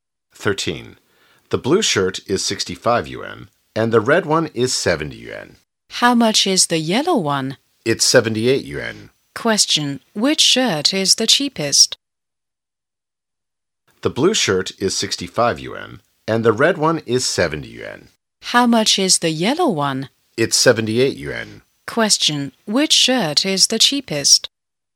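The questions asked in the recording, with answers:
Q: which shirt is the cheapest?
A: The blue one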